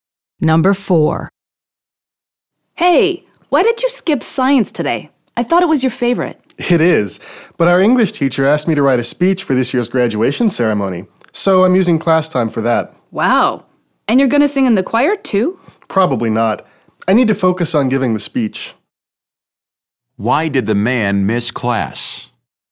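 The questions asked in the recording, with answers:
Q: Why did the man miss class?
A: To write a speech for the graduation ceremony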